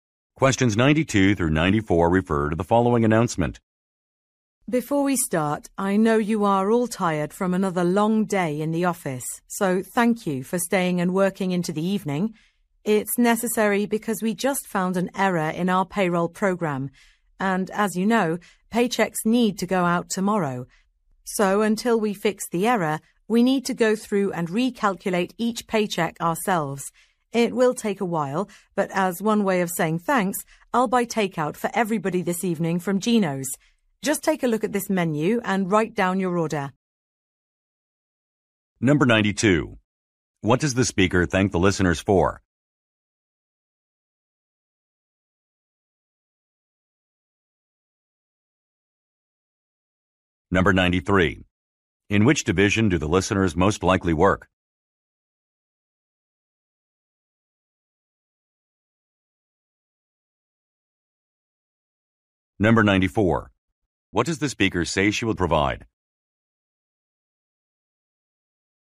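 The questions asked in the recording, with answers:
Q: What does the speaker thank the listeners for?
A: Staying to work into the evening

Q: In which division do the listeners most likely work?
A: Payroll

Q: What does the speaker say she will provide?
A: Takeout food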